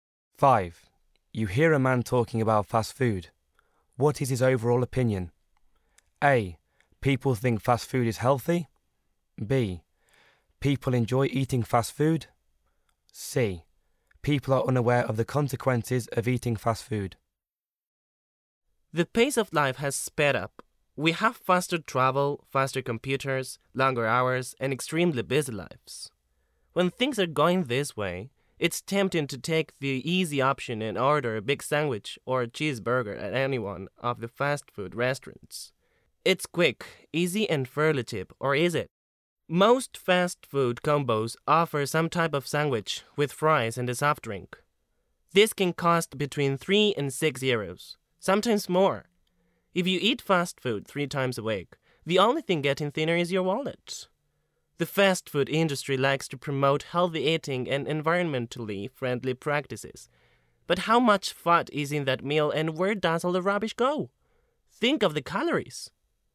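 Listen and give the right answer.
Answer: C: People are unaware of the consequences of eating fast food.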